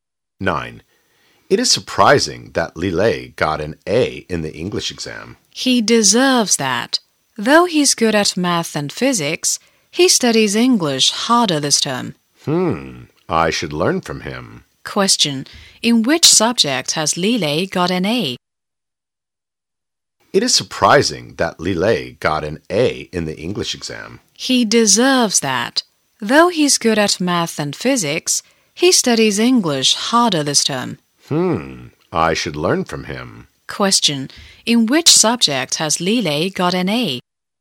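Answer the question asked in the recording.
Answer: English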